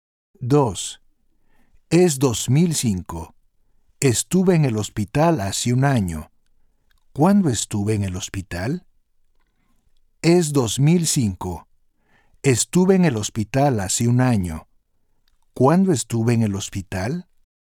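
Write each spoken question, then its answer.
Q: ¿Cuándo estuve en el hospital?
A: en 2004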